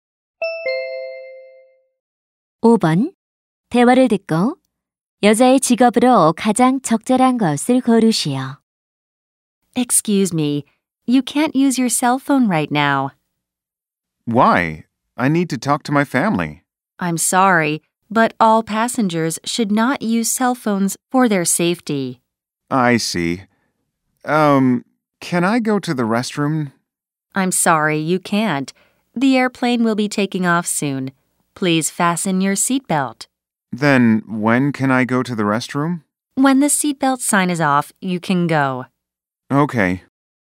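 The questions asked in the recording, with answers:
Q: 대화를 듣고 여자의 직업으로 가장 적절한 것을 고르시오.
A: 승무원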